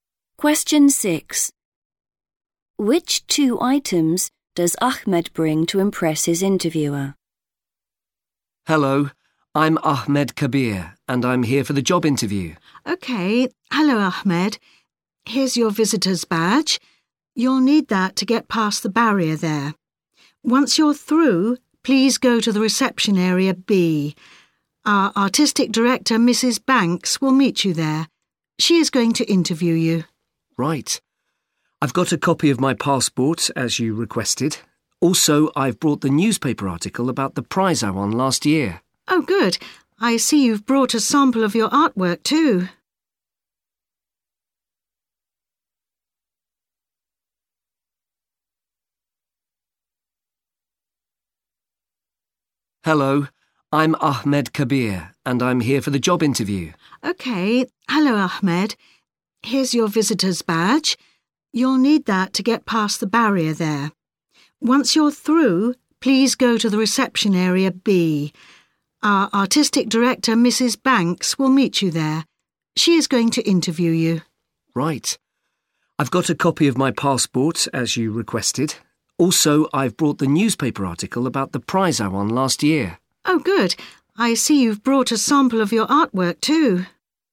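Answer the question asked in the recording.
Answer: a newspaper article about the prize he won and a sample of his artwork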